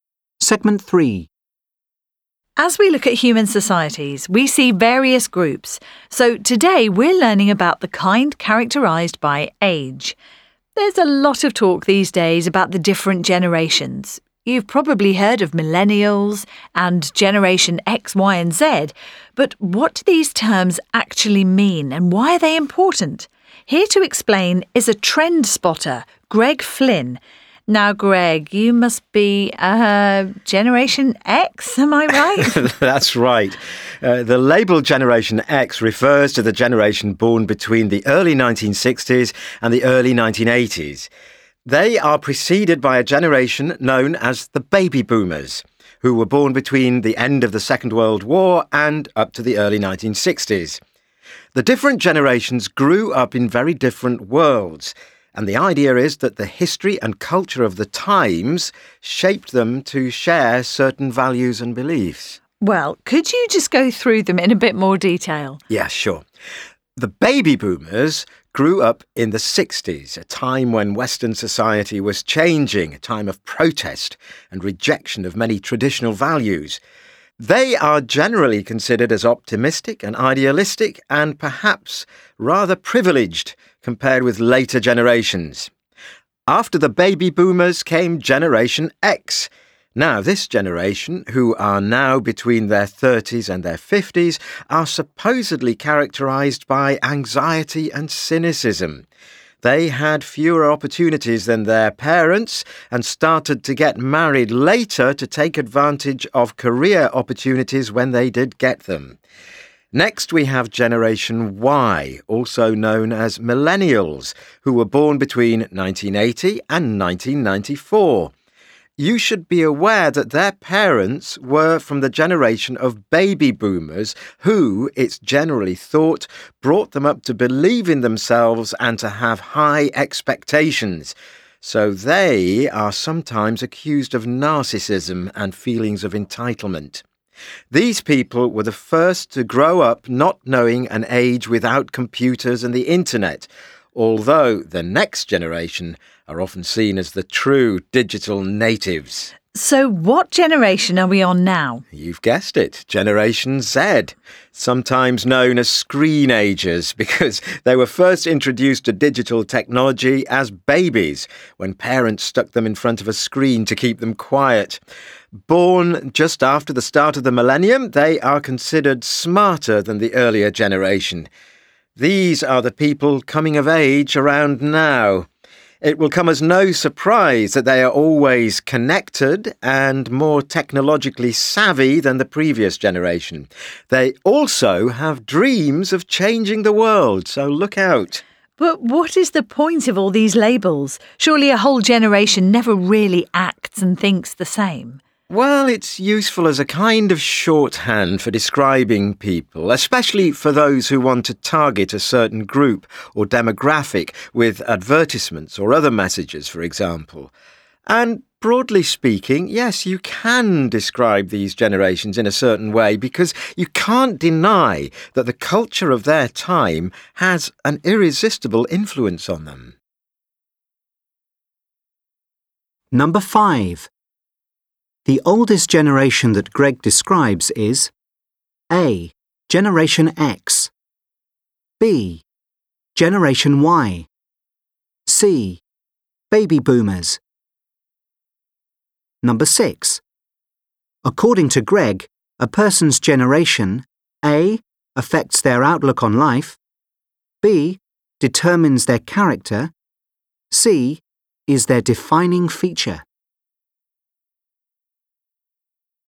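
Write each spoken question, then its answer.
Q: The oldest generation that Greg describes is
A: C: Baby Boomers.

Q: According to Greg, a person's generation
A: A: affects their outlook on life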